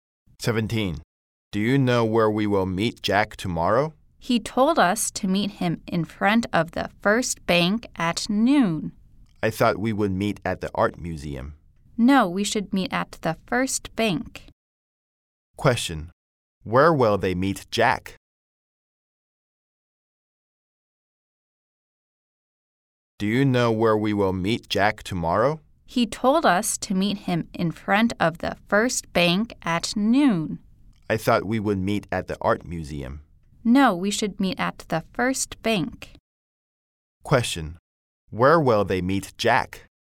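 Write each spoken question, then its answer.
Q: Where will they meet Jack?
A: In front of the First Bank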